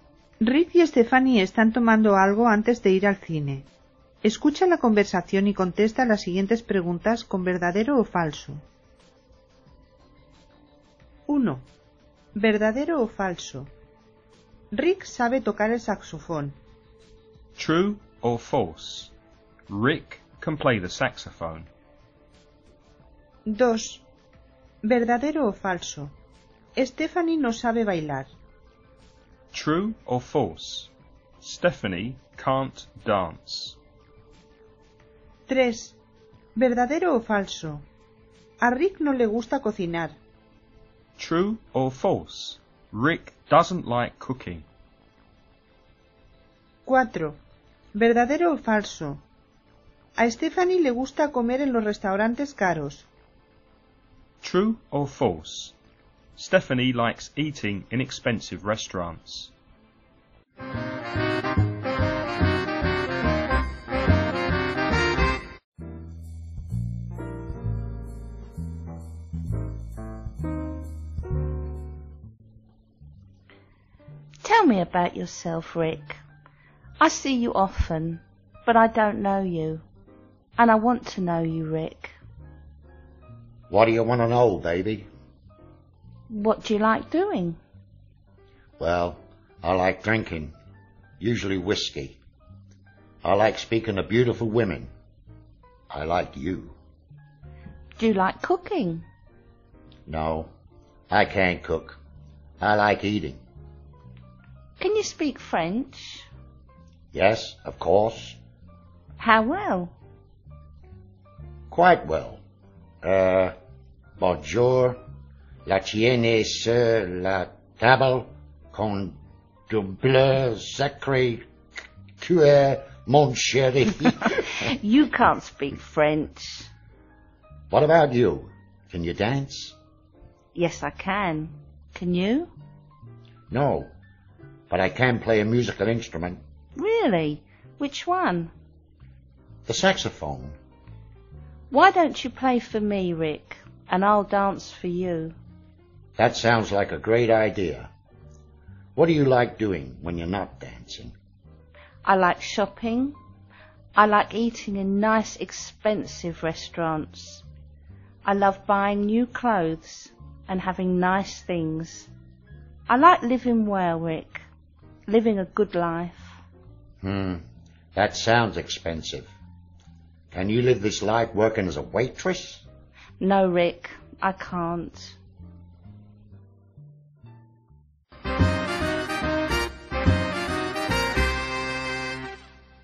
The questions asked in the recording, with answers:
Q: True or false? Rick can play the saxophone.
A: Verdadero.

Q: True or false? Stephanie can't dance.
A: Falso.

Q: True or false? Rick doesn't like cooking.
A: Verdadero.

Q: True or false? Stephanie likes eating in expensive restaurants.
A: Verdadero.